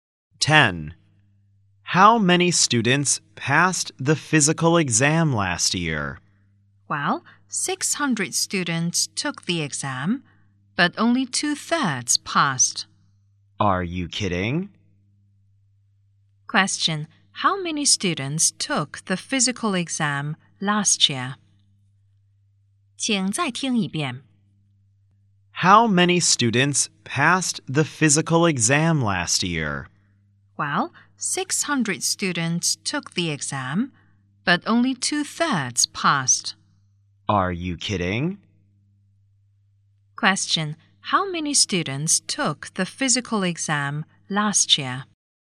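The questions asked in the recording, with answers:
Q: Question: how many students took the physical exam last year?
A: 600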